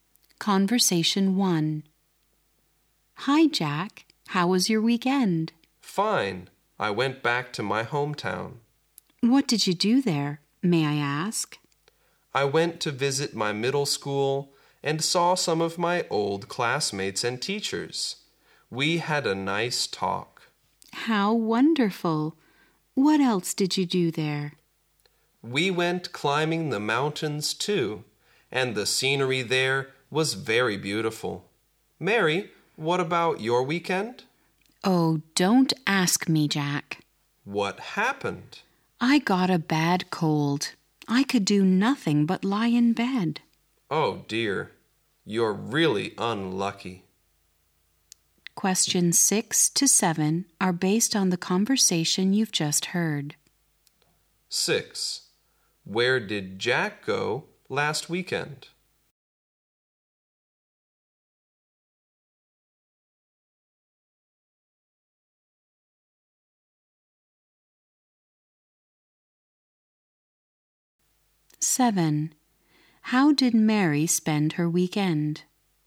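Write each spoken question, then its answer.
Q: Where did Jack go last weekend?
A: His hometown

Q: How did Mary spend her weekend?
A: Lying in bed with a bad cold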